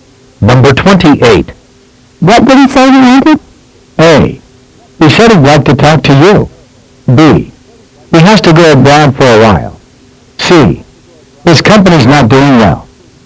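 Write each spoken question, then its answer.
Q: What did he say he wanted?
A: A: He said he'd like to talk to you.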